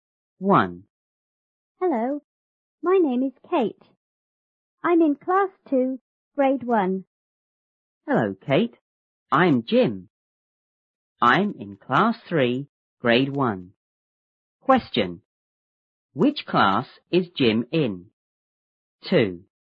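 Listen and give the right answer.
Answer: Class 3, Grade 1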